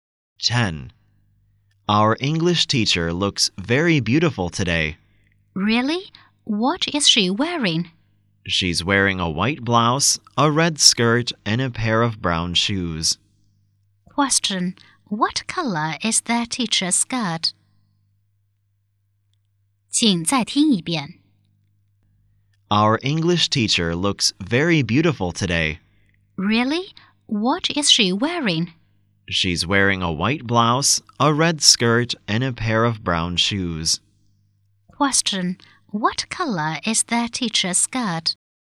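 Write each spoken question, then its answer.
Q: What color is their teacher's skirt?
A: Red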